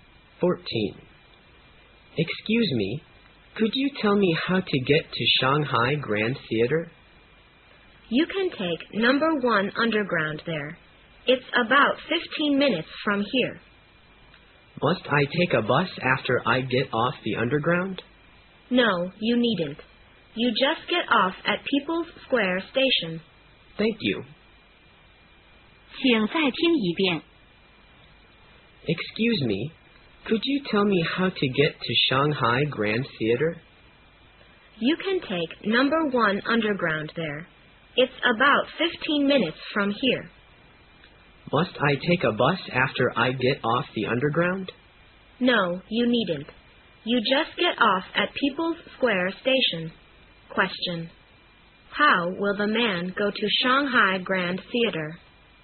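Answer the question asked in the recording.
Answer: By underground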